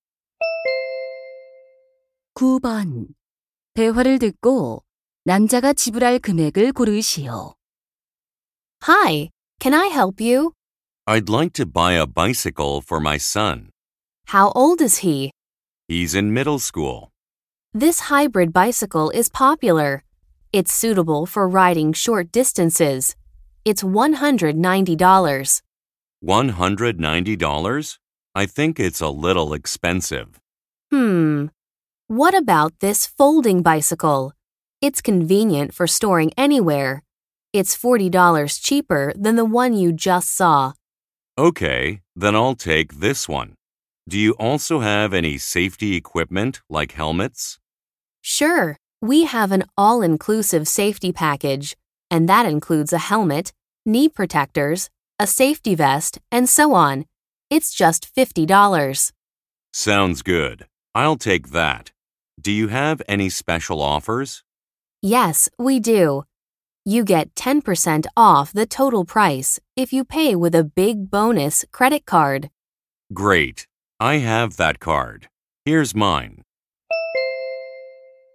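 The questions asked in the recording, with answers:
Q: 대화를 듣고 남자가 지불할 금액을 고르시오.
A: $180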